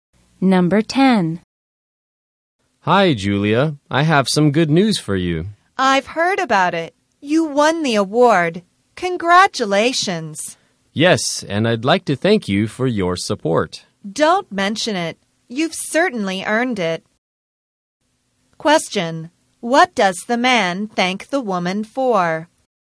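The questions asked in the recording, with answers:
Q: What does the man thank the woman for?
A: Her support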